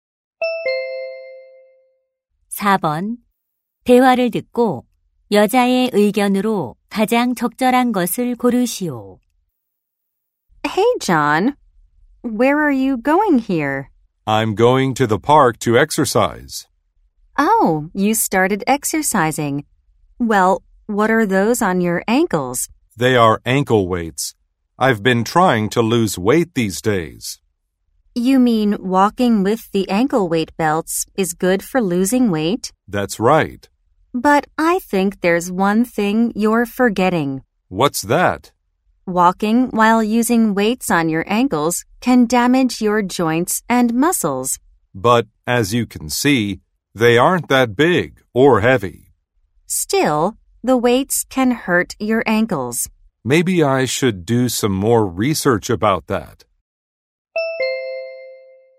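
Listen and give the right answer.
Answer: 발목에 모래주머니를 차고 걷는 것은 관절과 근육을 손상시킬 수 있다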